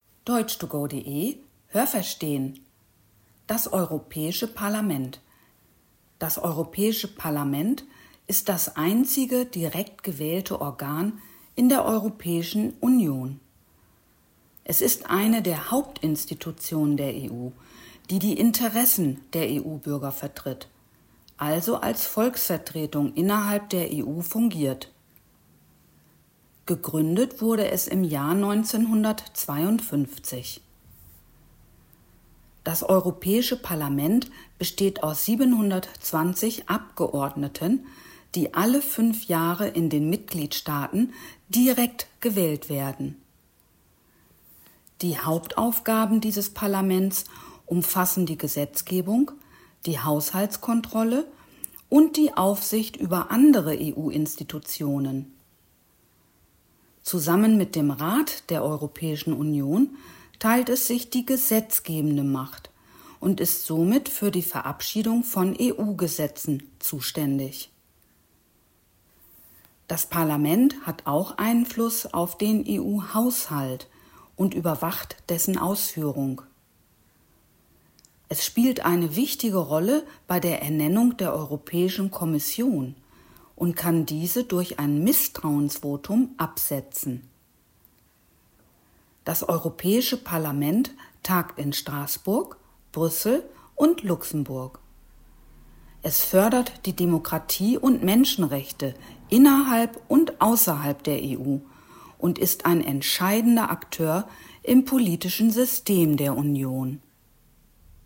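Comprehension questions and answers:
Haben Sie das gehört? Stimmt diese Aussage?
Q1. Das Europäische Parlament (EP) ist das einzige direkt gewählte Organ der Europäischen Union.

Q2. Gegründet wurde das Europäische Parlament im Jahr 1950.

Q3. Die Abgeordneten des EP werden alle 4 Jahre in den Mitgliedsstaaten direkt gewählt.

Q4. Die Hauptaufgaben dieses Parlaments umfassen die Gesetzgebung, die Haushaltskontrolle und die Aufsicht über andere EU-Institutionen.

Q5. Zusammen mit dem Rat der Europäischen Union teilt es sich die gesetzgebende Macht, ist also für die Verabschiedung von EU-Gesetzen zuständig.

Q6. Der Haushalt (= Einnahmen und Ausgaben) der EU ist unabhängig vom Europäischen Parlament.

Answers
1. Ja, das habe ich gehört.
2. Nein, das habe ich nicht gehört.
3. Nein, das habe ich nicht gehört.
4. Ja, das habe ich gehört.
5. Ja, das habe ich gehört.
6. Nein, das habe ich nicht gehört.

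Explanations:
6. Das Europäische Parlament überwacht den Haushalt der Europäischen Union.

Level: C1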